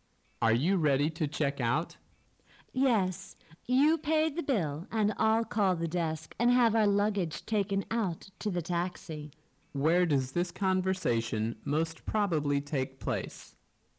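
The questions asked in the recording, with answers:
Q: Where does this conversation most probably take place?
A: In a hotel

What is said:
[听力原文] M: Are you ready to check out? W: Yes. You pay the bill, and I'll call the desk and have our luggage taken out to the taxi. Q: Where does this conversation most probably take place?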